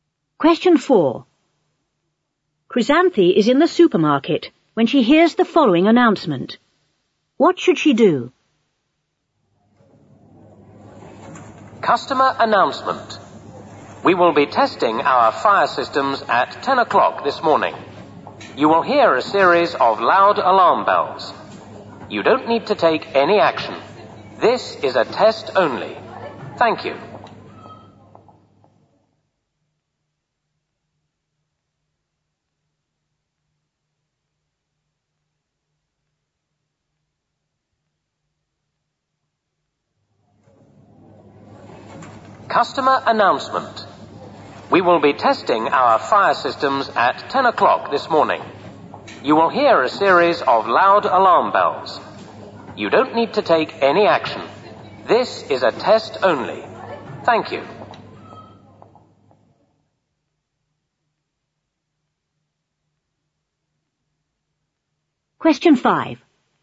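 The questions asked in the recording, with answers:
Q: What should she do?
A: Nothing; it is only a test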